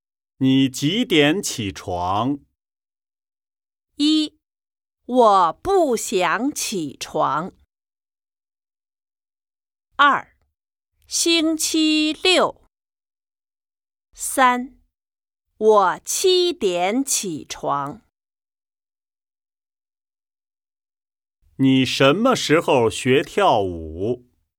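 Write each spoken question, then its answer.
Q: 你几点起床?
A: 三: 我七点起床。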